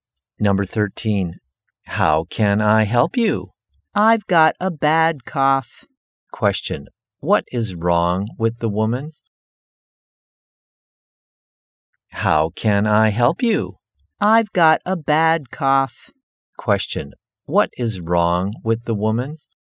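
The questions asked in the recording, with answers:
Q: Question. What is wrong with the woman?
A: She has a bad cough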